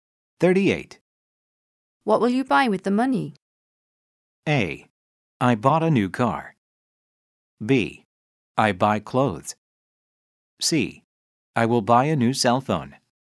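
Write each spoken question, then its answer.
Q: What will you buy with the money?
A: C: I will buy a new cell phone.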